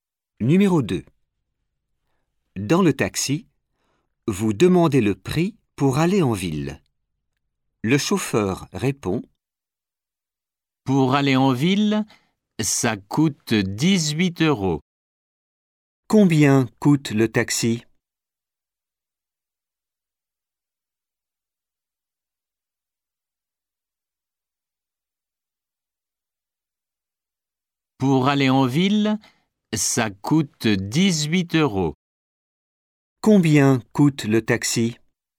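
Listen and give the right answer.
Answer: 18 euros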